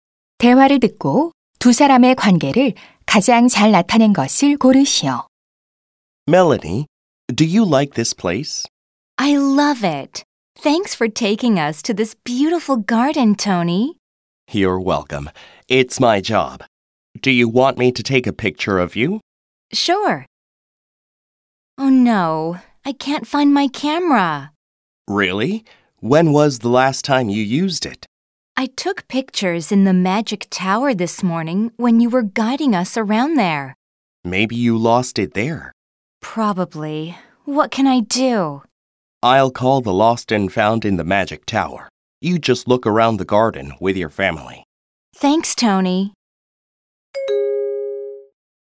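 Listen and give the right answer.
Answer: 여행 가이드 - 관광객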